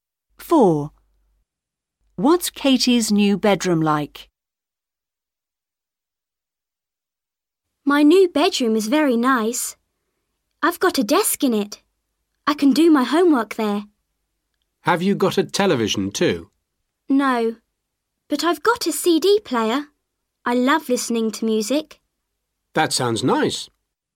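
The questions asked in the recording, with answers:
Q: What's Katie's new bedroom like?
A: It has a desk and a CD player, but no television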